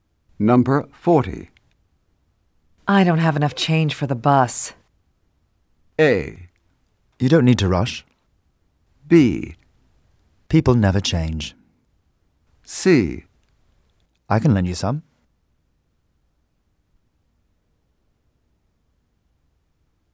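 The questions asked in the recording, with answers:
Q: I don't have enough change for the bus.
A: C: I can lend you some.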